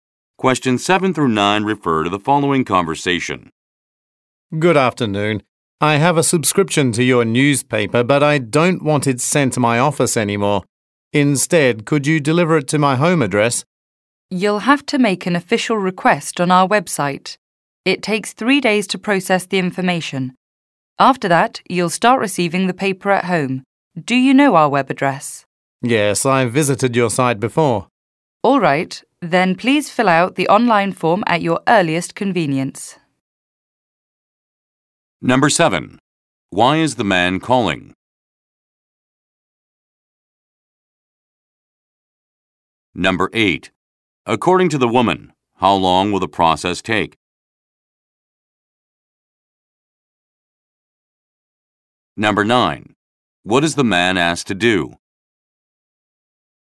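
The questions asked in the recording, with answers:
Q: Why is the man calling?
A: To have his newspaper delivered to his home address instead of his office

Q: According to the woman, how long will the process take?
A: 3 days

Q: What is the man asked to do?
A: Fill out the online form on the website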